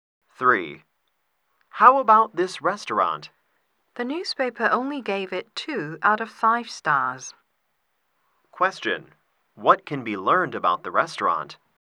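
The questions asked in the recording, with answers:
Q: What can be learned about the restaurant?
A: It is not highly rated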